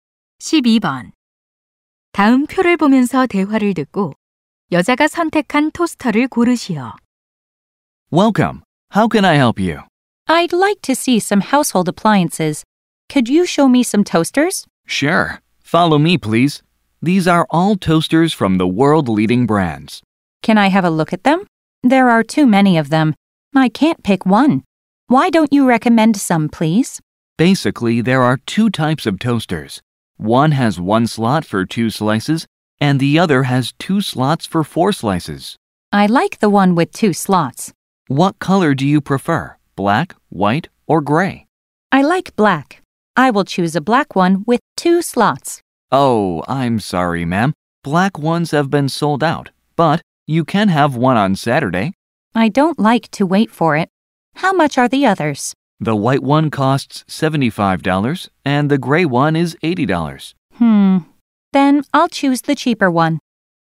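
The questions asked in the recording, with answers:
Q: 다음 표를 보면서 대화를 듣고 여자가 선택한 토스터를 고르시오.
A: 슬롯 2개짜리 흰색 토스터($75)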